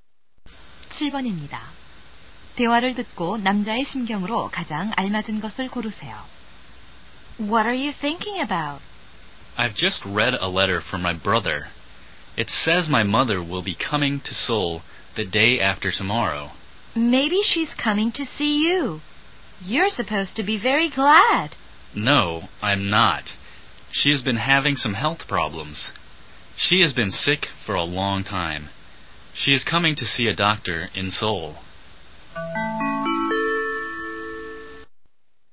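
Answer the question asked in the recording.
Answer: 걱정스러움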